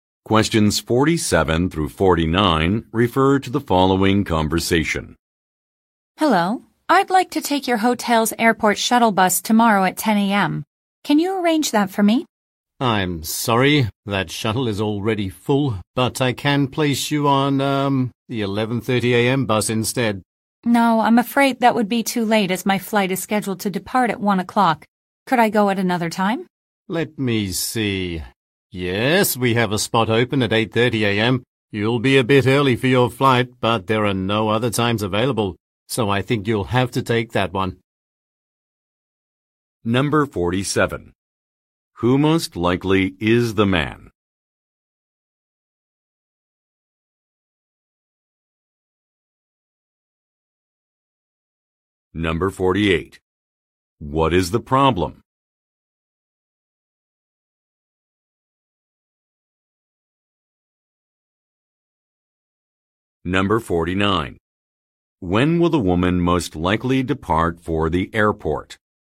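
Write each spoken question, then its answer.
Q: Who most likely is the man?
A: A hotel employee

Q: What is the problem?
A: The 10 a.m. shuttle is already full

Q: When will the woman most likely depart for the airport?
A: At 8:30 a.m.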